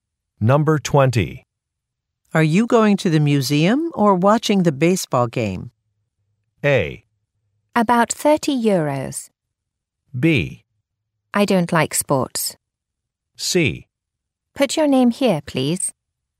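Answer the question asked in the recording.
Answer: B: I don't like sports.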